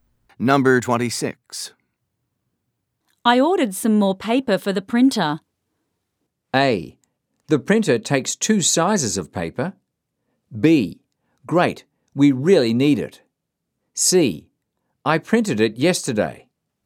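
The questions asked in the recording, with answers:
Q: I ordered some more paper for the printer.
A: B: Great, we really need it.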